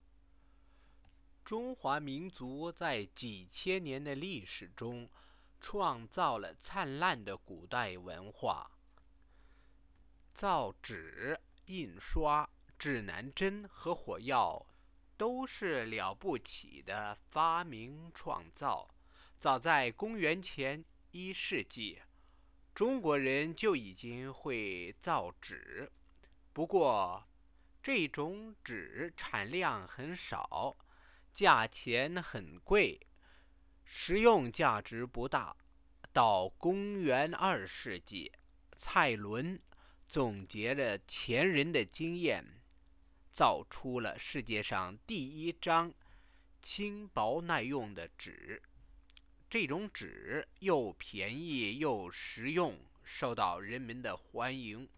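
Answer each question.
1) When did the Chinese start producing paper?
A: As early as the 1st century BC (公元前1世纪)

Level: Second year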